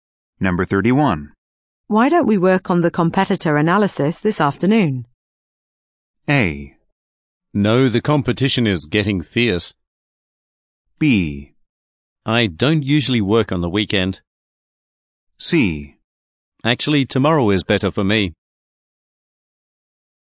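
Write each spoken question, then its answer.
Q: Why don't we work on the competitor analysis this afternoon?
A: C: Actually, tomorrow is better for me.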